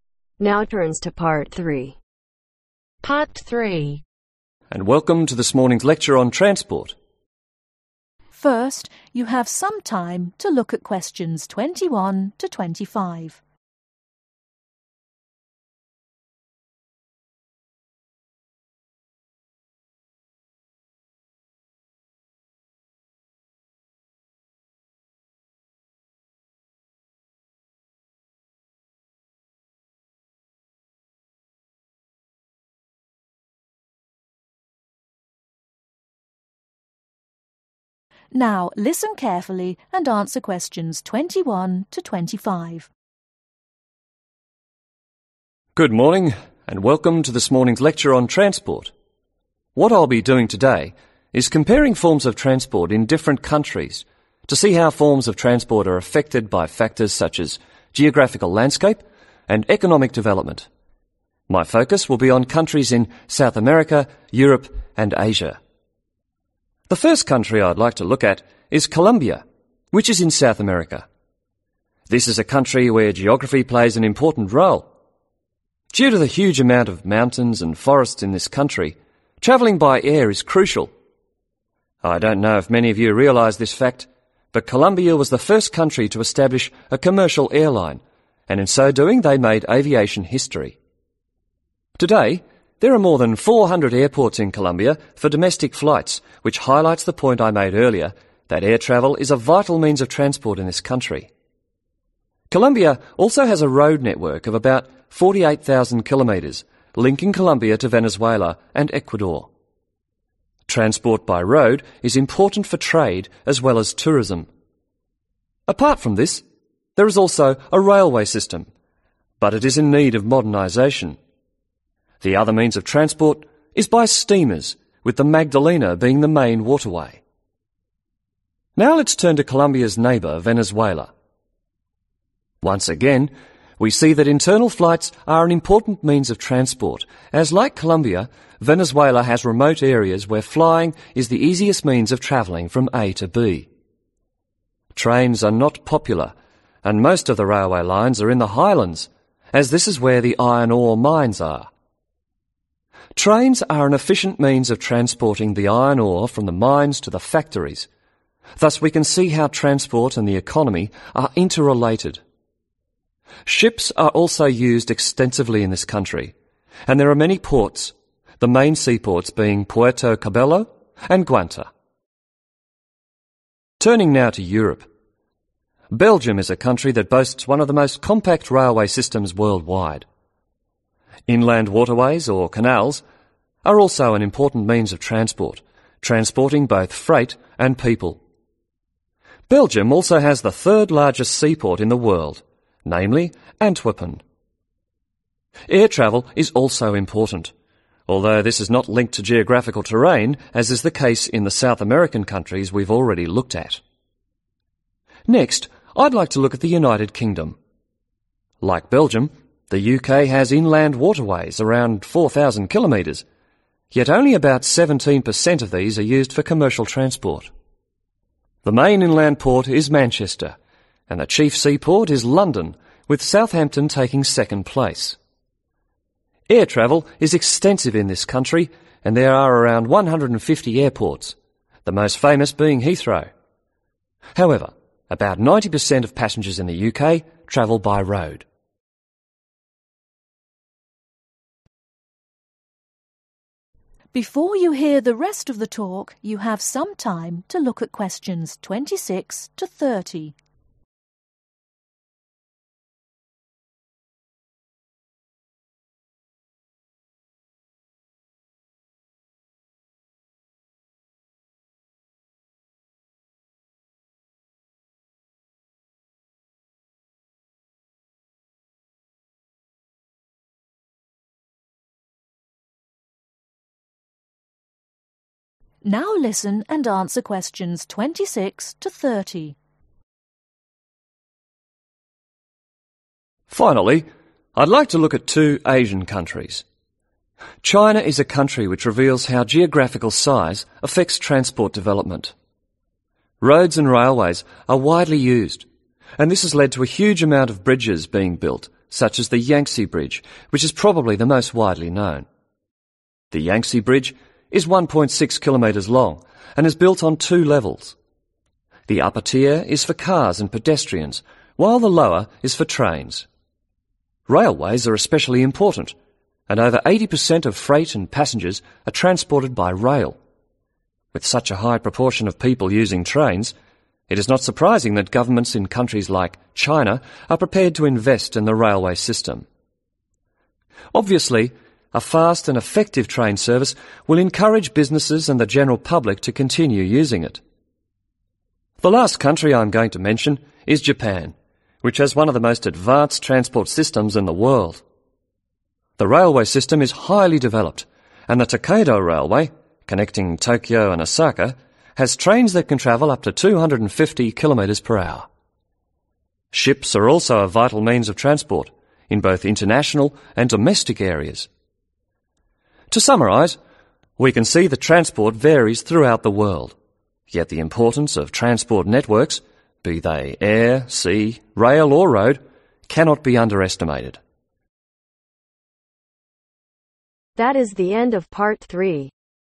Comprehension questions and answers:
Write NO MORE THAN TWO WORDS AND/OR A NUMBER for each answer.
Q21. Made aviation history by establishing the first (21) .................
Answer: COMMERCIAL AIRLINE

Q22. Over (22) .................. airports.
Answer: 400

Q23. Iron ore mines can be found in (23).................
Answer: HIGHLANDS

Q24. About (24) ................. of inland waterways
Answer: 4000 km

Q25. Proportion of road travellers is around (25) ................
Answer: 90%

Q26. Transport development in china has been affected by its (26) ...............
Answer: GEOGRAPHICAL SIZE

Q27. bridges have been built such as the Yangtse which has two (27) ..............,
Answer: LEVELS TIERS

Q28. one for cars and people and one for (28) ..............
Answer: TRAINS

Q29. Japan has a highly developed railway network with trains that can travel up to (29) ............... per hour.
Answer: 250 km

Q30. Ships are also used for both international and (30) ................. transport.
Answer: DOMESTIC